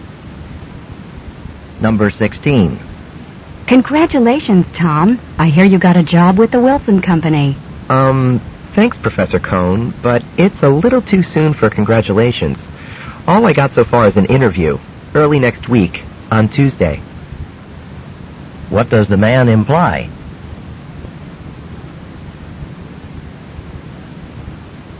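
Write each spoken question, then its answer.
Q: What does the man imply?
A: He hasn't been offered the job yet; he only has an interview.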